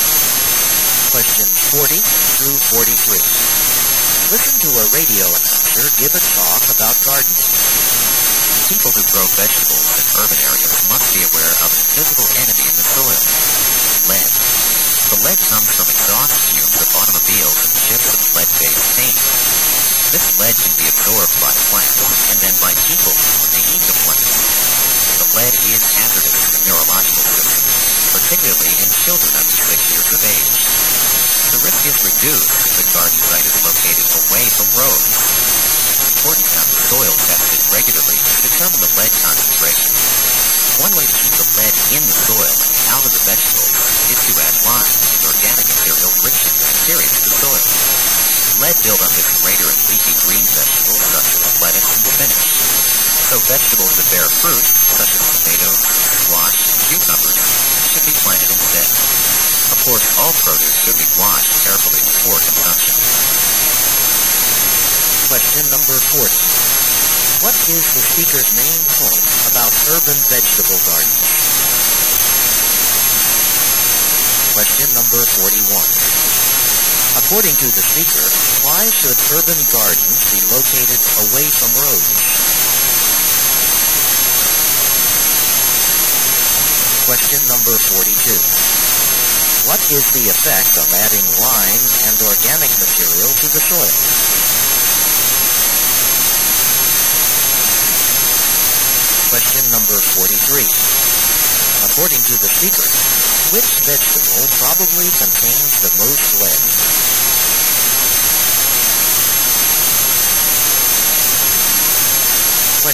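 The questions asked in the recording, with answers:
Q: What is the speaker's main point about urban vegetable gardens?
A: Lead in the soil can be dangerous

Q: According to the speaker, why should urban gardens be located away from roads?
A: To reduce lead from car exhaust

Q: What is the effect of adding lime and organic material to the soil?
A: It keeps lead in the soil and out of the vegetables

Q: According to the speaker, which vegetable probably contains the most lead?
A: Lettuce or spinach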